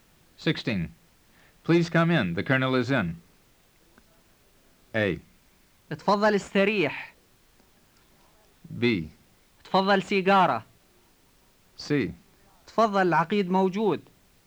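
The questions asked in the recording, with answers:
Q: Please come in. The Colonel is in.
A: C: تفضل العقيد موجود.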